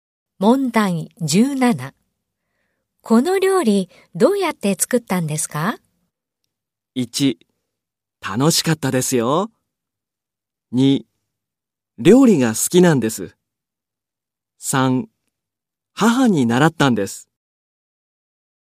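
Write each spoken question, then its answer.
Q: この料理どうやって作ったんですか?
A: 3: 母に習ったんです。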